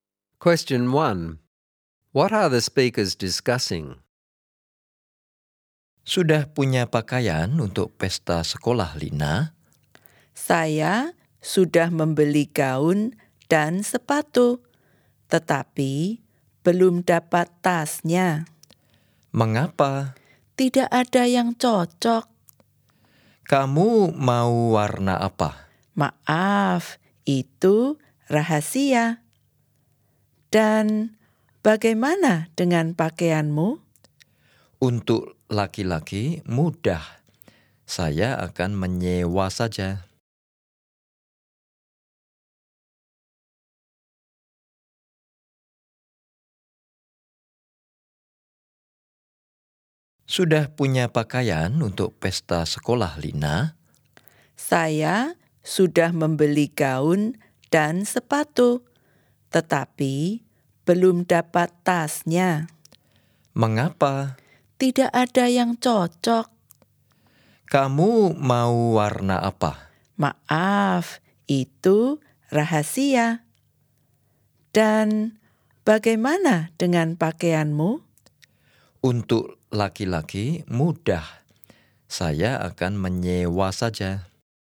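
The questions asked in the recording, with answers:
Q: What are the speakers discussing?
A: What they will wear to the school party (Lina still needs a bag; the boy will hire his outfit)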